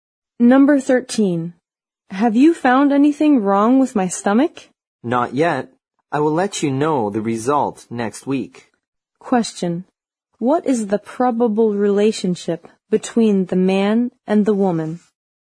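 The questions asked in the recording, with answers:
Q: What is the probable relationship between the man and the woman?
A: Doctor and patient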